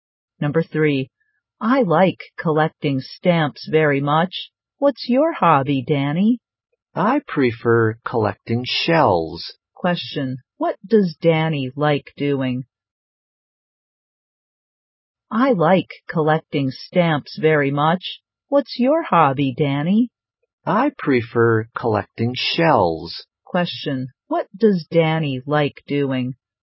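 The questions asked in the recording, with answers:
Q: Question, what does Danny like doing?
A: Collecting shells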